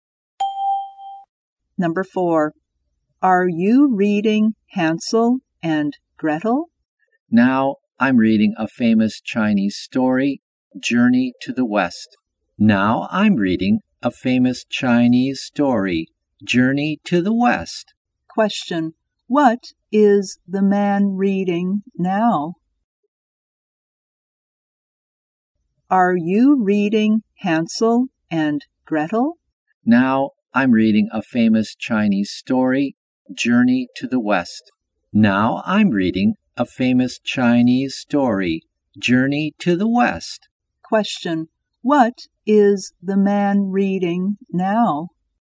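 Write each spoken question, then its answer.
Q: Question. What is the man reading now?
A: Journey to the West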